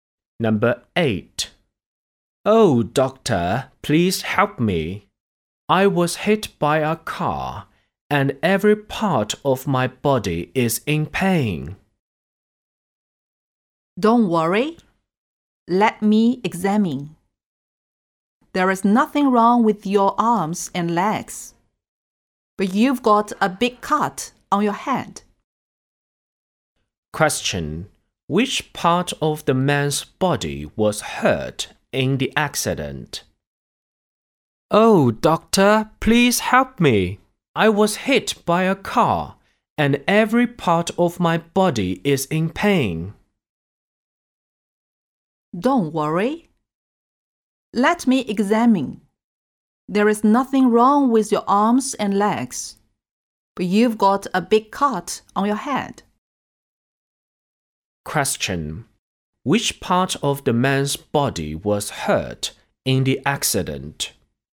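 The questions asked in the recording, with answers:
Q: Which part of the man's body was hurt in the accident?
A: His head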